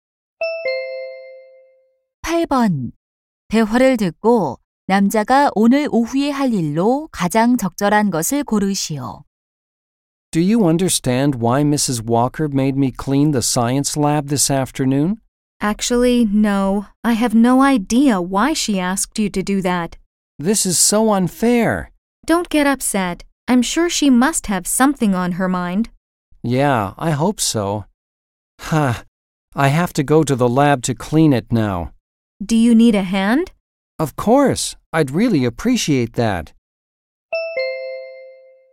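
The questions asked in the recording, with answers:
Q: 대화를 듣고 남자가 오늘 오후에 할 일로 가장 적절한 것을 고르시오.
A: 과학 실험실 청소하기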